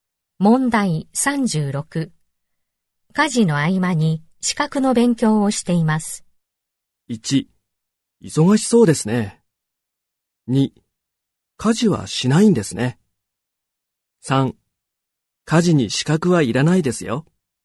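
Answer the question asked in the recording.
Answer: 1: 忙しそうですね。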